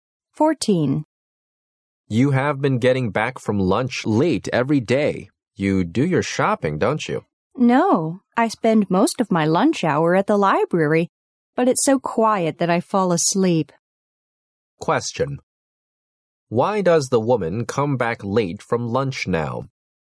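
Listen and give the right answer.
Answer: She falls asleep in the quiet library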